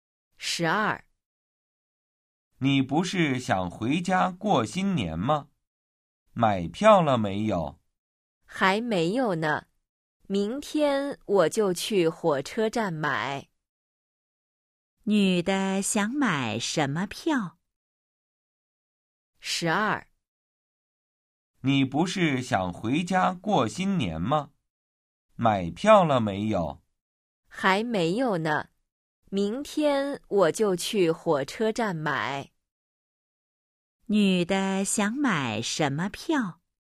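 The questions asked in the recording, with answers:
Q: 女的想买什么票?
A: 火车票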